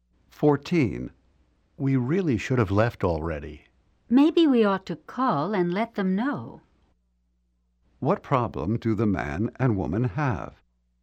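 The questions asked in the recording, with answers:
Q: What problem do the man and woman have?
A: They are late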